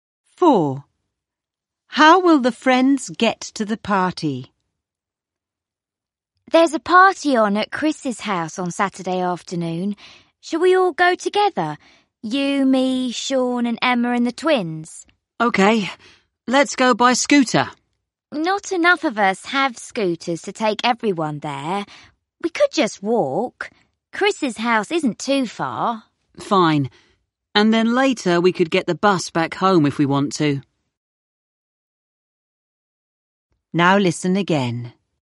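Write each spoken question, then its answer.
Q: How will the friends get to the party?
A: They will walk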